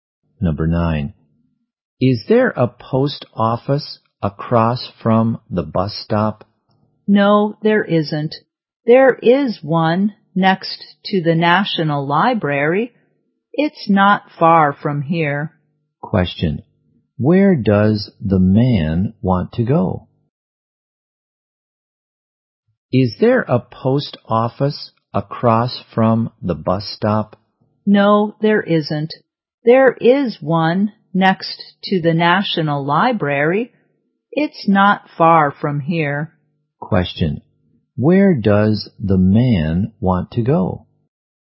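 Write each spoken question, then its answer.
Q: Question. Where does the man want to go?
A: A post office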